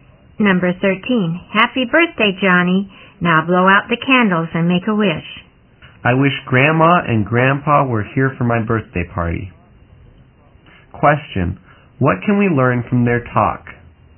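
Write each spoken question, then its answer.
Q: Question, what can we learn from their talk?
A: Johnny's grandparents are not at his birthday party.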